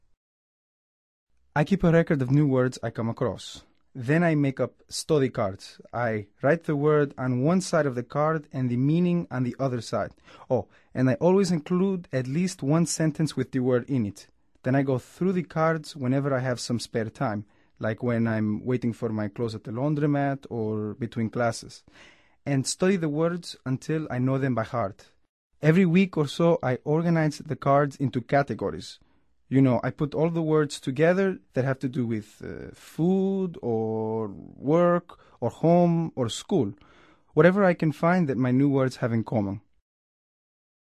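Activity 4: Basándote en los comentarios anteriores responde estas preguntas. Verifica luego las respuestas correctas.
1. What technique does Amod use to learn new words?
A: He makes study cards with the word on one side, the meaning and an example sentence on the other, and reviews them in his spare time.

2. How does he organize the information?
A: Every week or so he organizes the cards into categories, such as food, work, home or school.

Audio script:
I keep a record of new words I come across. Then I make up study cards. I write the word on one side of the card and the meaning on the other side. Oh, and I always include at least one sentence with the word in it. Then I go through the cards whenever I have some spare time – like when I'm waiting for my clothes at the laundromat or between classes – and study the words until I know them by heart. Every week or so, I organize the cards into categories: you know, I put all the words together that have to do with food ... 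or work ... or home ... or school ... whatever I can find that my new words have in common.

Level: Nivel Avanzado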